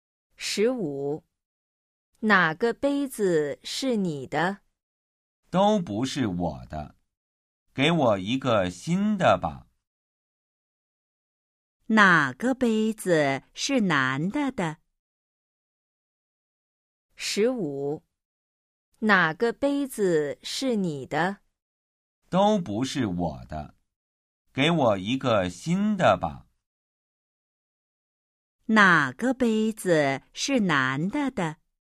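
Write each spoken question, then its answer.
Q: 哪个杯子是男的的?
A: 都不是他的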